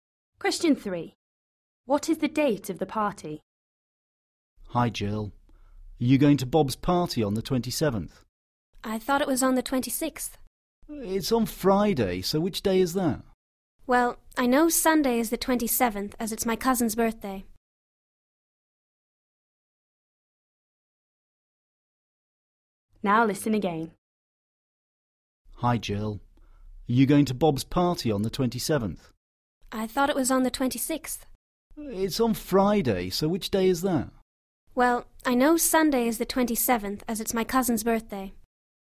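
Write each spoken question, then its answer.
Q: What is the date of the party?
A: the 25th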